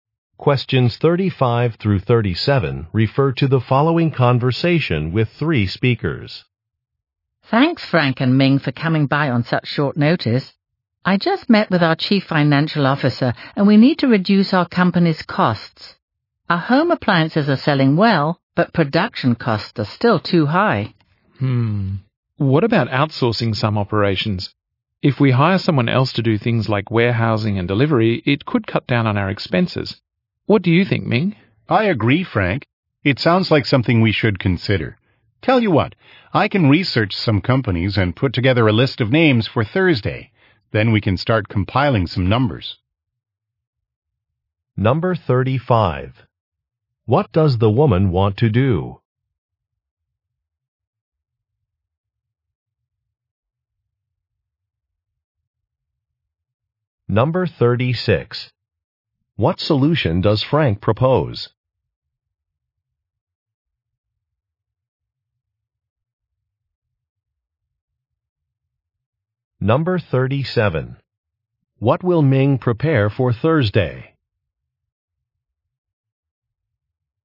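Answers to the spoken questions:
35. Reduce the company's costs
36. Outsourcing some operations
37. A list of companies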